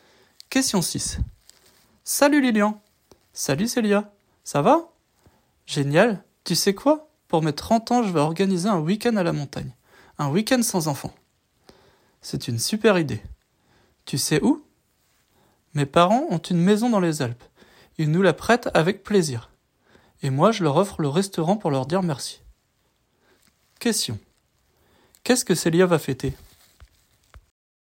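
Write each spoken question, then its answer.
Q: Qu'est-ce que Célia va fêter?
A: Ses 30 ans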